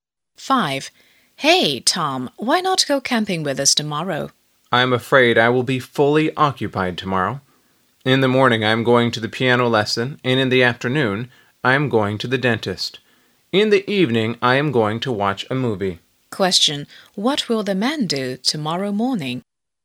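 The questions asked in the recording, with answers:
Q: What will the man do tomorrow morning?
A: Go to a piano lesson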